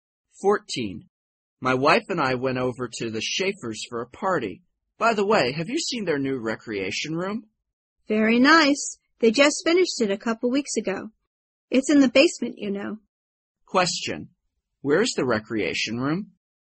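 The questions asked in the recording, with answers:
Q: Where is the recreation room?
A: In the basement.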